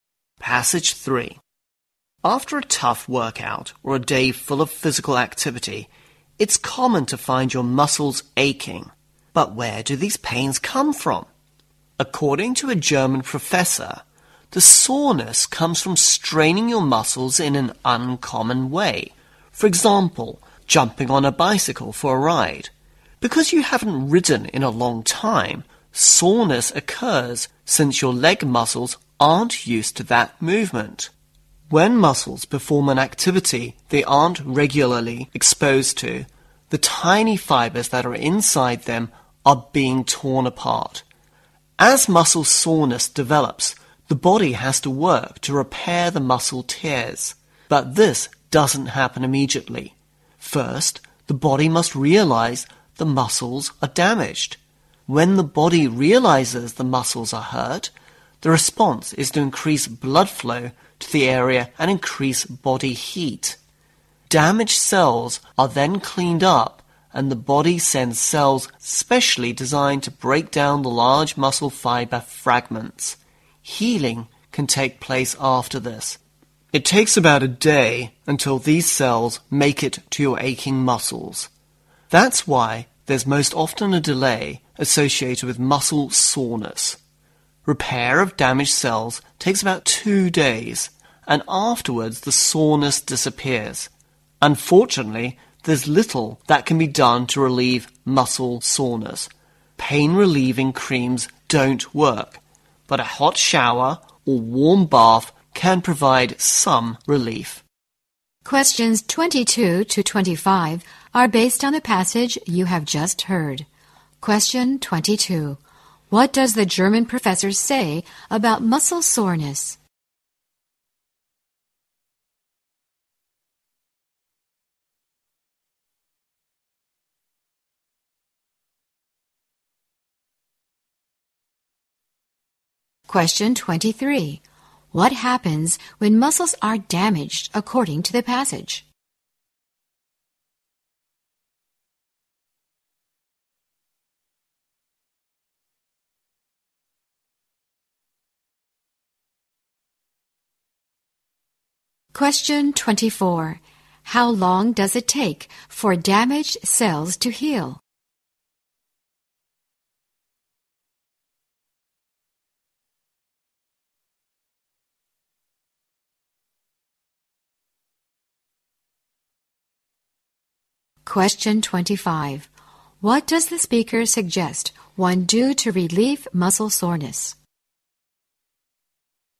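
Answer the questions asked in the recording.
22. It comes from straining muscles in an uncommon way.
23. The body increases blood flow to the area and increases body heat.
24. About 2 days.
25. Take a hot shower or a warm bath.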